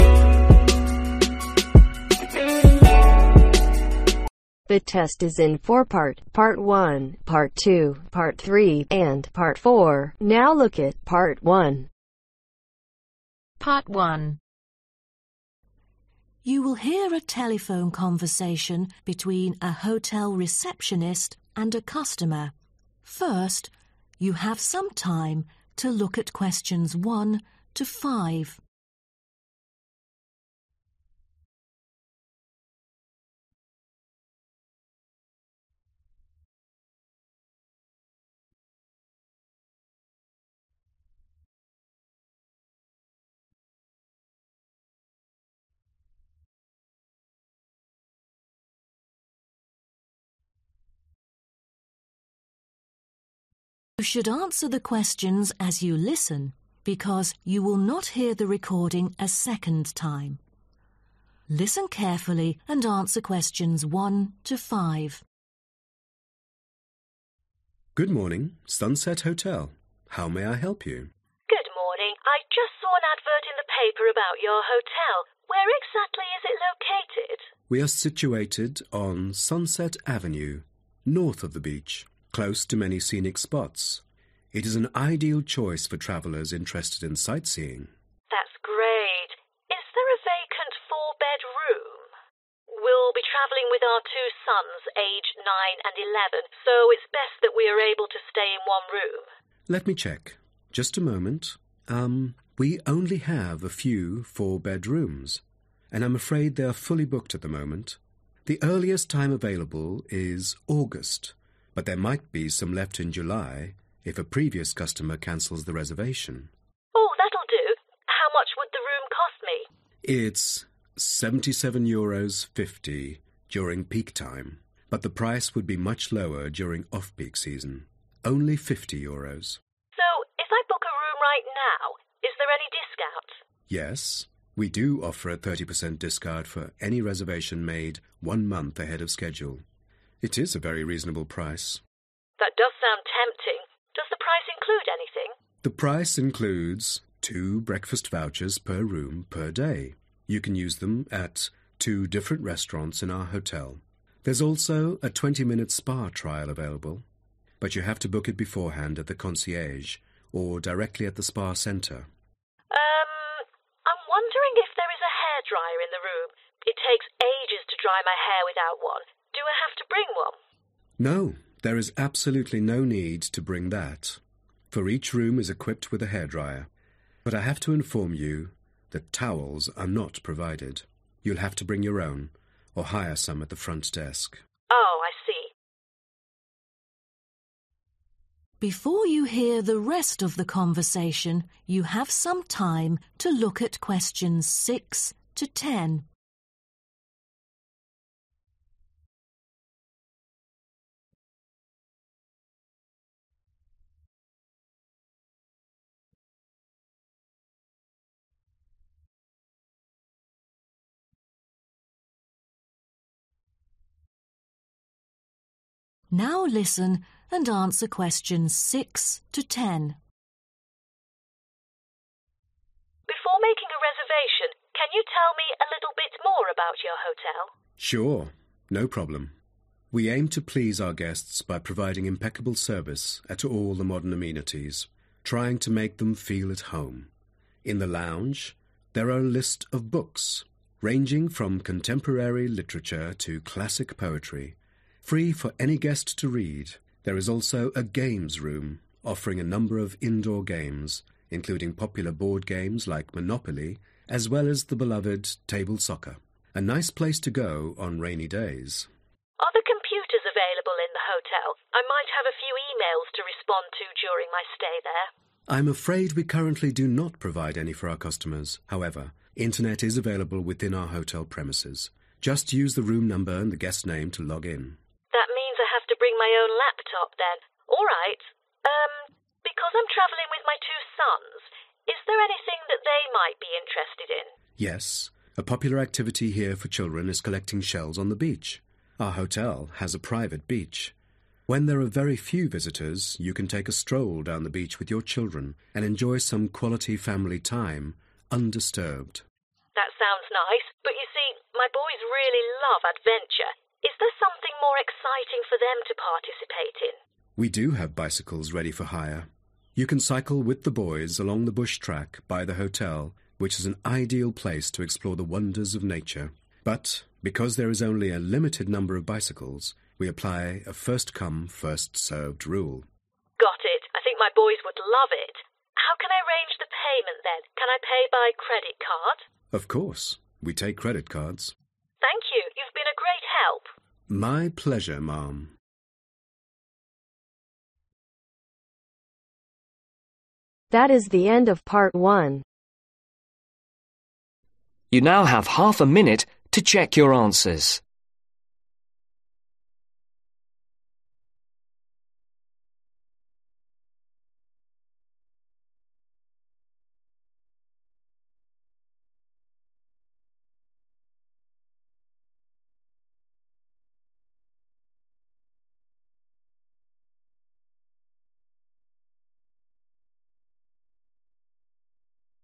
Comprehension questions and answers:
Complete the notes below. Write ONE WORD AND/OR A NUMBER for each answer.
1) Four-bed room available in (1)............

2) - in high season: (2)............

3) - cheaper if you booked one (3)............ in advance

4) Meal included in price: (4)............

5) Must bring your own: (5)............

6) - a lounge with a variety of (6)............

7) - (7)............ room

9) - collect (9)............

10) - hire (10)............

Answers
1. August
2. 77.5/77.50
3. Month
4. Breakfast
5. Towels
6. Books
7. Games
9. Shells
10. Bicycles